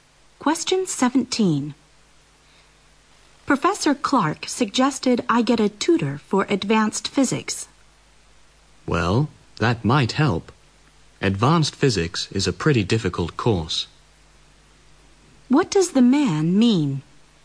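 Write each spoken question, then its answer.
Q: What does the man mean?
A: Getting a tutor is a good idea because the course is difficult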